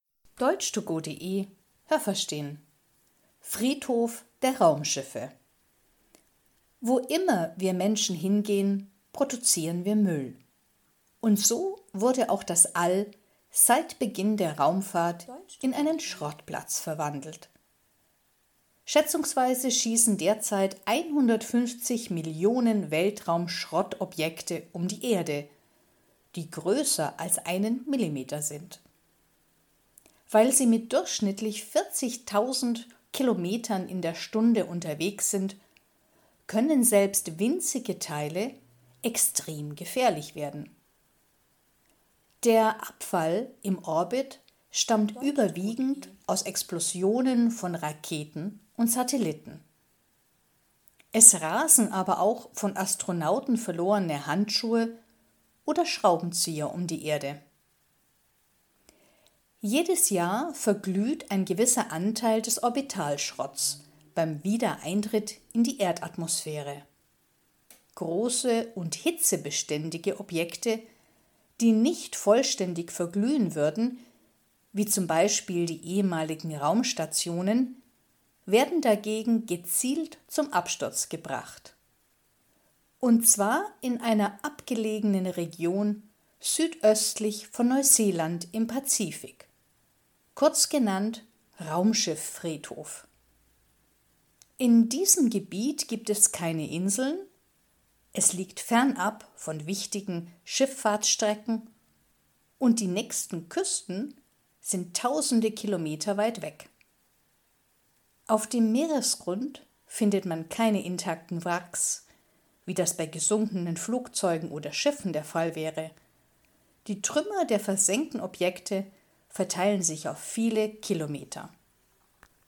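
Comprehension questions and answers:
Haben Sie das gehört? Stimmt diese Aussage?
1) 150 Millionen millimetergroße Weltraumschrott-Objekte fliegen um die Erde.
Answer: Nein, das habe ich nicht gehört.

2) Auch ganz kleine Abfallteile rasen mit mehreren zehntausend Kilometern durch den Orbit und können gefährlich werden.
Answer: Ja, das habe ich gehört.

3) Weltraumabfälle stammen ausschließlich aus Explosionen von Raketen und Satelliten.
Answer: Nein, das habe ich nicht gehört.

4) Ein Teil des Weltraumschrotts löst sich durch starke Hitze auf, wenn er in die Erdatmosphäre eintritt.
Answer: Ja, das habe ich gehört.

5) Objekte, die nicht selber verglühen, werden kontrolliert versenkt.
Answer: Ja, das habe ich gehört.

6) Im Raumschiff-Friedhof, südöstlich von Neuseeland, gibt es nur kleine Inseln und keine wichtigen Schifffahrtsstrecken.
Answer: Nein, das habe ich nicht gehört.

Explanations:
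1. 150 Millionen Objekte, die größer als einen Millimeter sind.
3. Sie machen zwar den überwiegenden Teil aus, aber es fliegen z.B. auch Schraubenzieher oder Handschuhe um die Erde.

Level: C2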